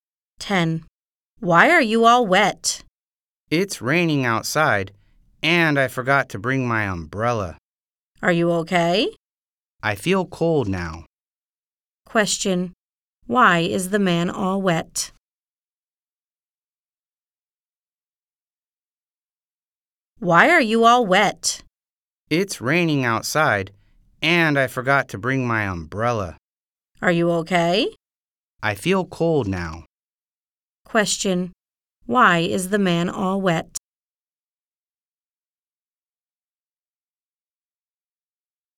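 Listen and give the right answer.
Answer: It's raining and he forgot to bring his umbrella.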